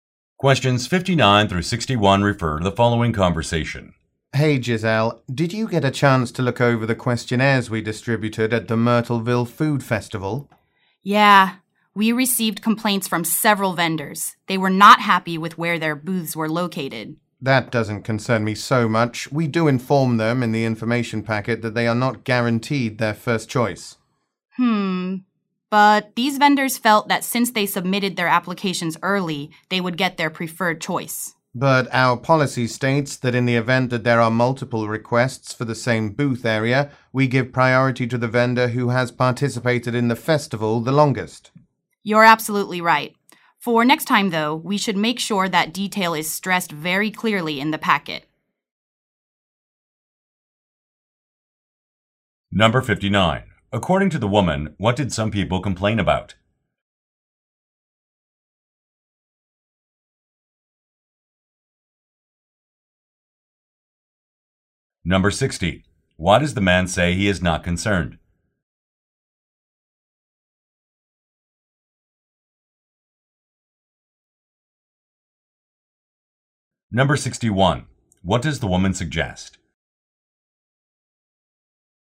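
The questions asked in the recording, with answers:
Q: According to the woman, what did some people complain about?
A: Their booth locations

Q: Why does the man say he is not concerned?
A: The information packet says first choice is not guaranteed

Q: What does the woman suggest?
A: Stressing the booth policy clearly in the packet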